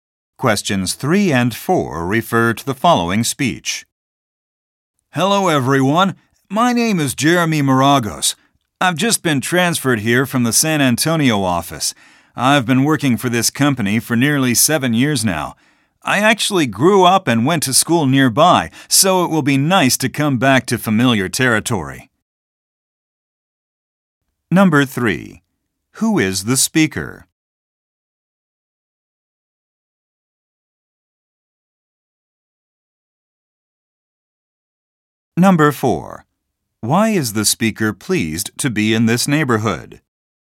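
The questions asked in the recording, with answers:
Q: Who is the speaker?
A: An employee newly transferred from the San Antonio office

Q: Why is the speaker pleased to be in this neighborhood?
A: He grew up and went to school nearby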